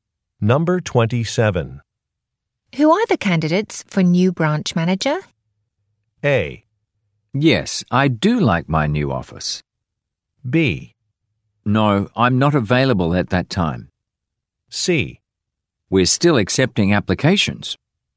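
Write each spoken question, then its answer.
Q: Who are the candidates for new branch manager?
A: C: We're still accepting applications.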